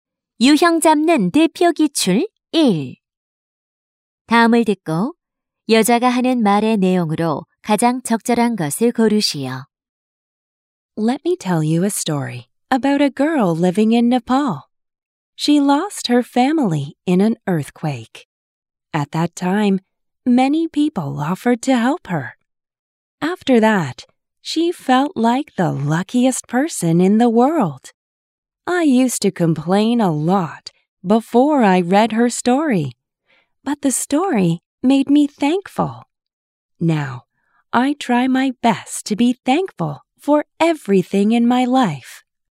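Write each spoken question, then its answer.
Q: 다음을 듣고 여자가 하는 말의 내용으로 가장 적절한 것을 고르시오.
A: 모든 것에 감사하는 마음을 가져야 한다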